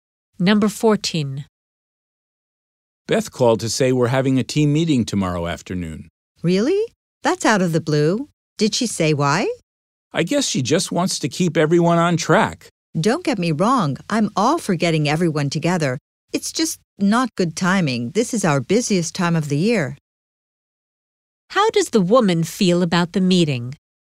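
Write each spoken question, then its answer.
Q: How does the woman feel about the meeting?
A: The timing is bad because it's the busiest time of year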